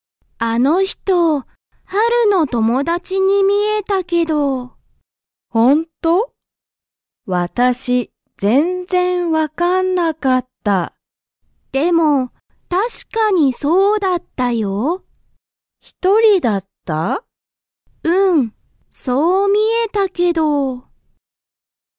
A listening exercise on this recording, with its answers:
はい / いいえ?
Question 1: 「あの人(ひと)」は一人(ひとり)でしたか?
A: はい

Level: Level 1